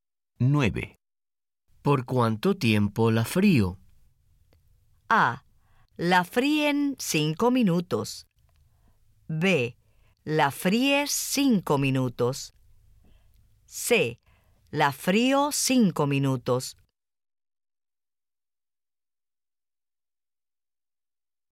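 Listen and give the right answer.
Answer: B: La fríes 5 minutos.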